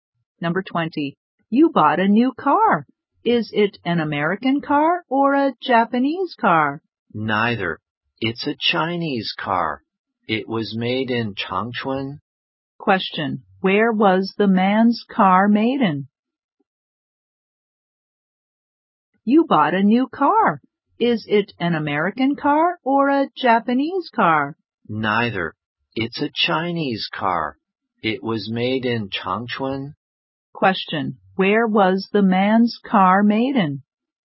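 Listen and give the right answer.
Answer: In Changchun, China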